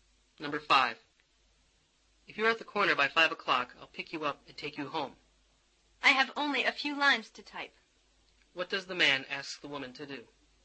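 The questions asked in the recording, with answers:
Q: What does the man ask the woman to do?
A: Be at the corner by 5 o'clock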